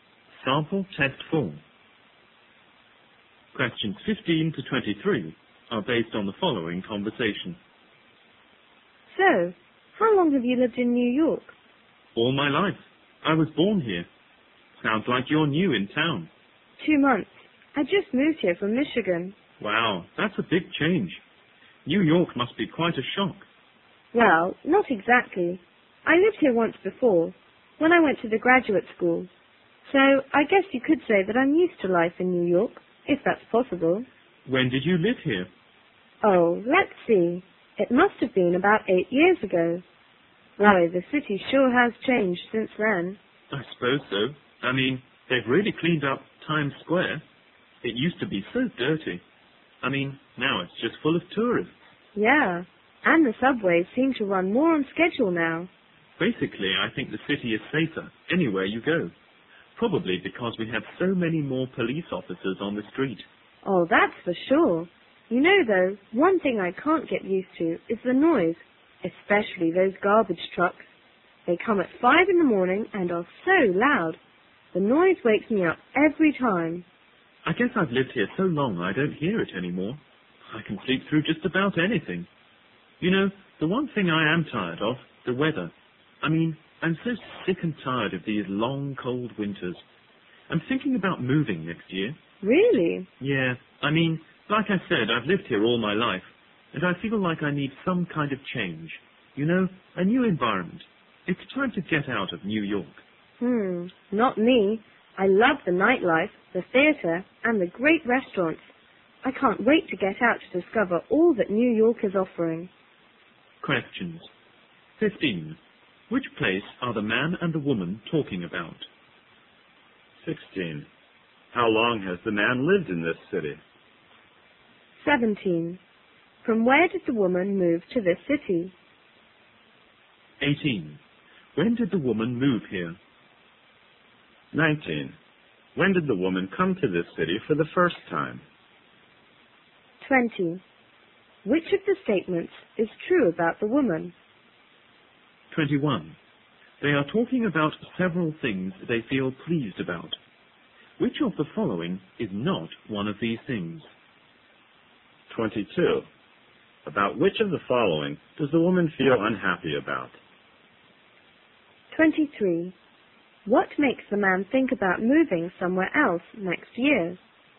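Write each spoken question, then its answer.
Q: Which place are the man and the woman talking about?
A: New York

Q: How long has the man lived in this city?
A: All his life

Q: From where did the woman move to this city?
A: Michigan

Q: When did the woman move here?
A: 2 months ago

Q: When did the woman come to this city for the first time?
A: About 8 years ago, for graduate school

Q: About which of the following does the woman feel unhappy about?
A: The noise, especially the garbage trucks

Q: What makes the man think about moving somewhere else next year?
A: He is tired of the long, cold winters and needs a change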